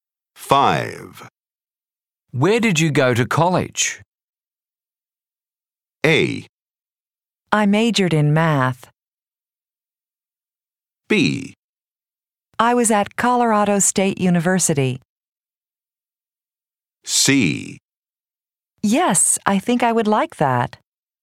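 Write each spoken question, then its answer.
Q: Where did you go to college?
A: B: I was at Colorado State University.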